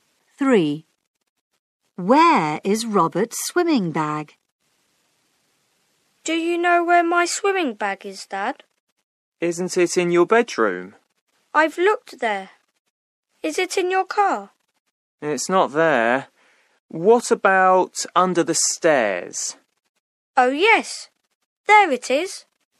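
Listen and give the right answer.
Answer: Under the stairs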